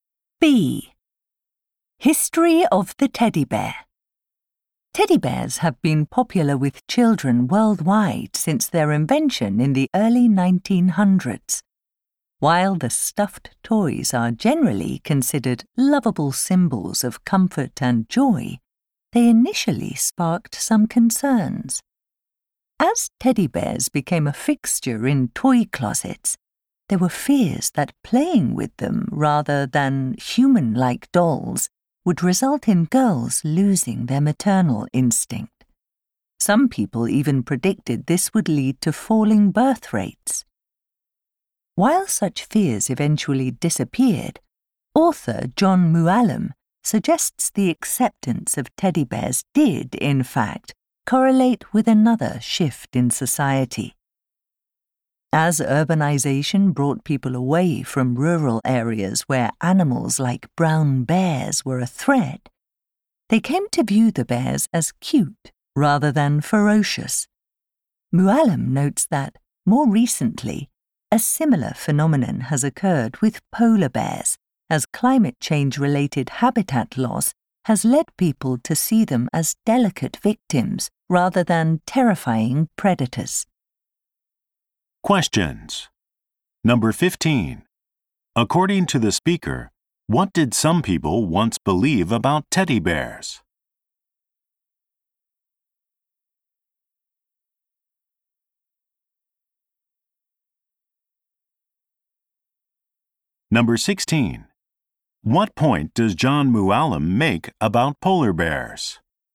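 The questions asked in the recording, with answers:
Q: According to the speaker, what did some people once believe about teddy bears?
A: They would make girls lose their maternal instinct.

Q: What point does John Mualim make about polar bears?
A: Habitat loss has led people to see them as delicate victims.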